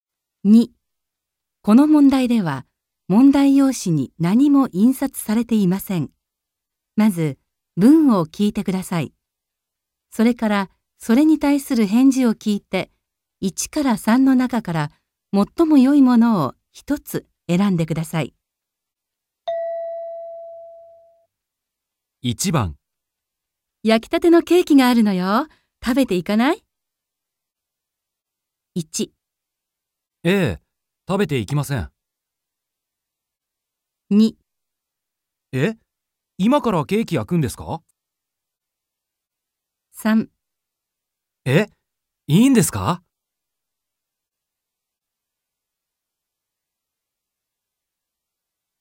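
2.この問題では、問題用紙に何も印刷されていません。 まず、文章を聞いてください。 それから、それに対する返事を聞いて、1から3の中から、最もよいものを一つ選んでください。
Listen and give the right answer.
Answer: 3. え? いいんですか。

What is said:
M: 1. ええ、食べていきません。
2. え? 今からケーキ焼くんですか。
3. え? いいんですか。

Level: N2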